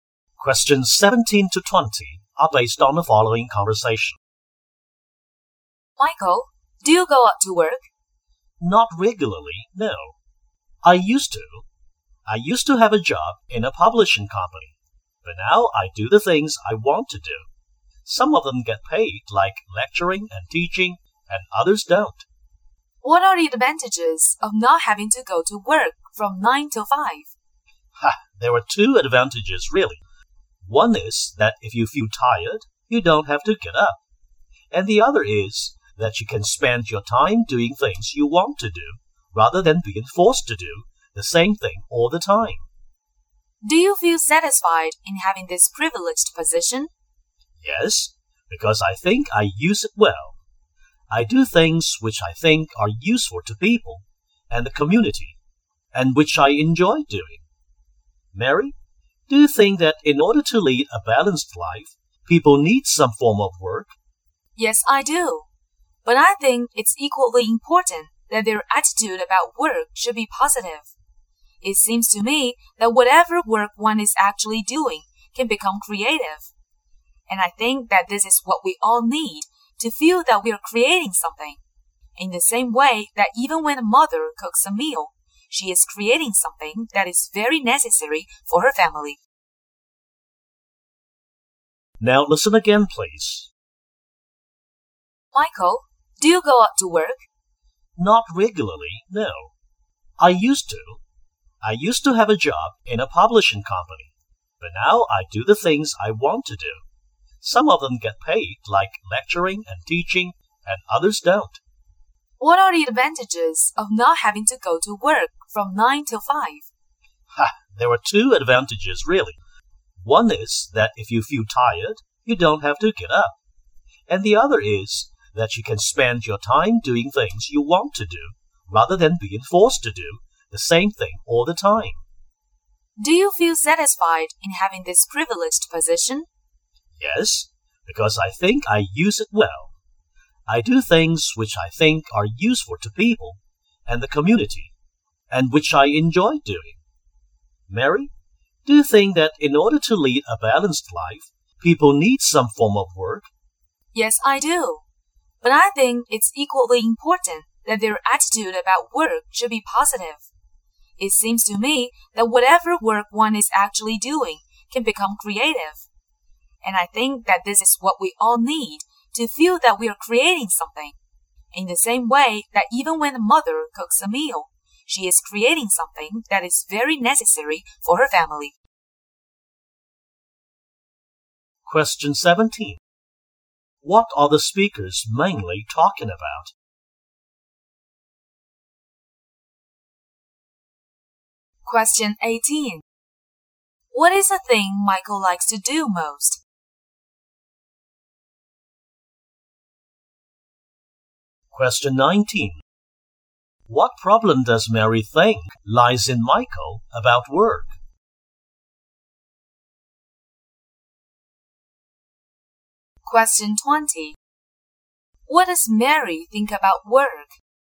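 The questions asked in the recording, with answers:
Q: What does Mary think about work?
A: People need work, and a positive attitude makes any work creative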